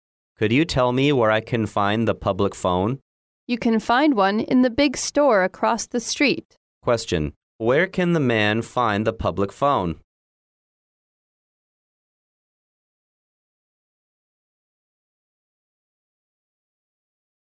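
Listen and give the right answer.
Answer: In the big store across the street.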